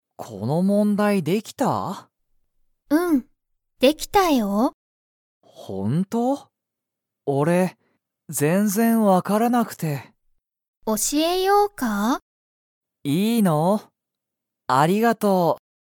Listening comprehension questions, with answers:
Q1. ナオキは、その問題もんだいができましたか?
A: いいえ

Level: Level 1